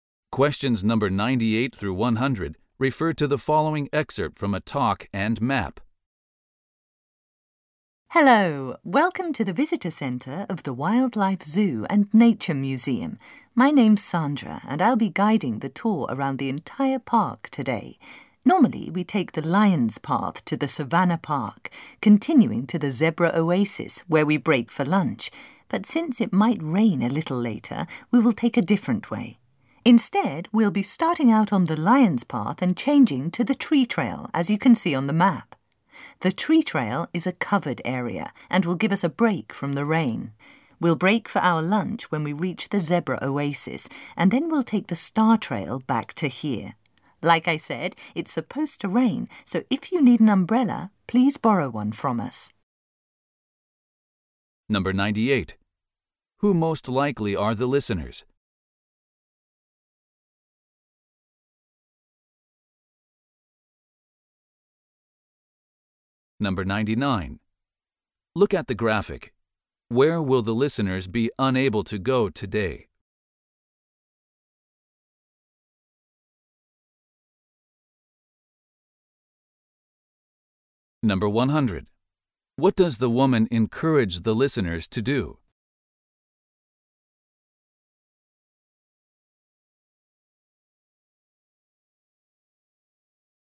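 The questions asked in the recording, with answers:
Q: Who most likely are the listeners?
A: Visitors on a tour of the wildlife zoo and nature park

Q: What does the woman encourage the listeners to do?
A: Borrow an umbrella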